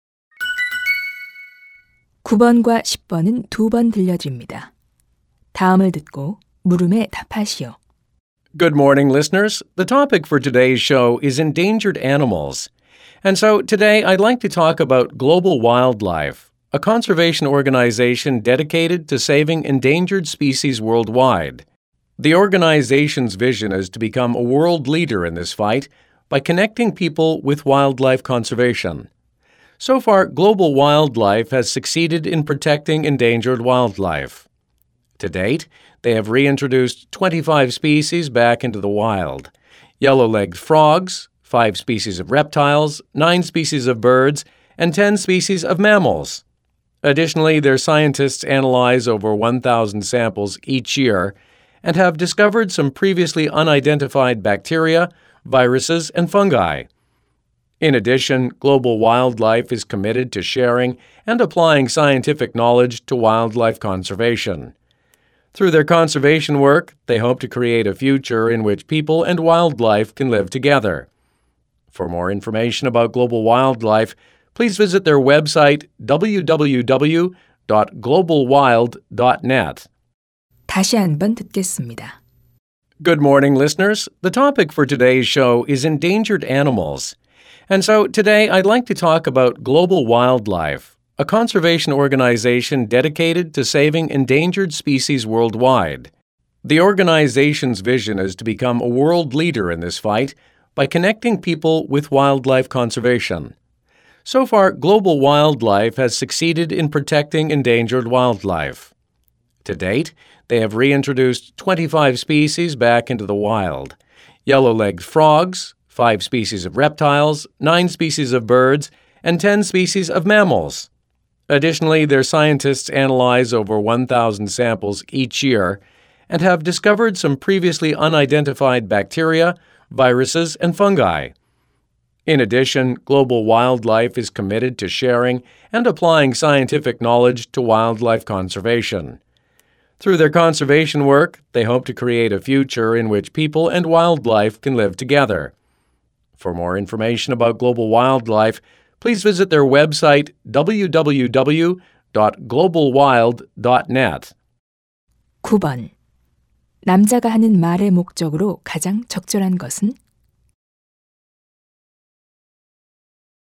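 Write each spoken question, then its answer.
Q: 남자가 하는 말의 목적으로 가장 적절한 것은?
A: 멸종 위기 동물 보호 단체 Global Wildlife를 소개하려고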